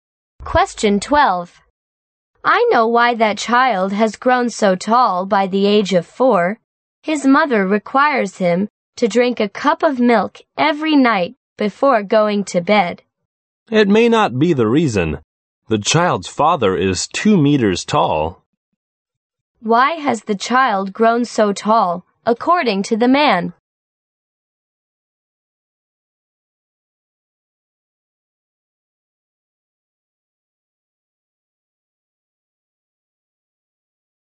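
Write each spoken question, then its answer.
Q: Why has the child grown so tall, according to the man?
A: Because his father is very tall (2 meters)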